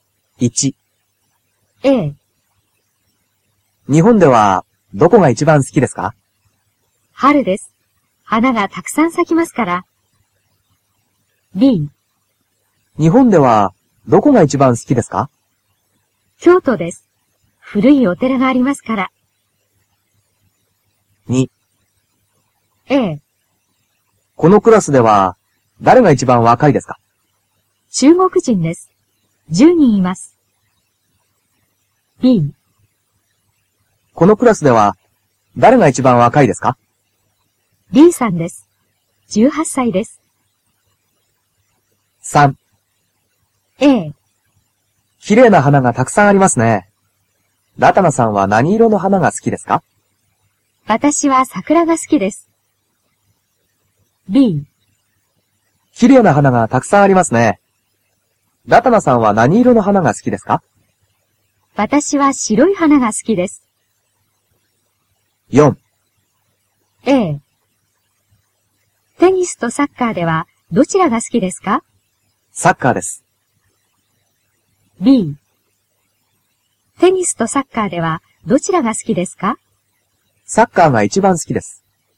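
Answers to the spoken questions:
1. B: 京都です。古いお寺がありますから。
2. B: B さんです。18歳です。
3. B: 私は白い花が好きです。
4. A: サッカーです。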